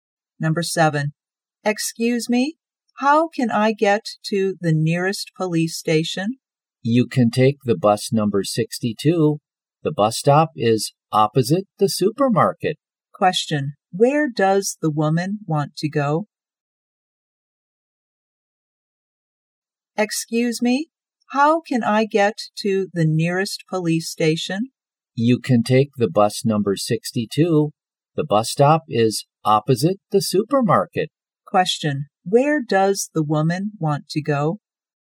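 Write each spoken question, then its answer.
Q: Question, where does the woman want to go?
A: The nearest police station.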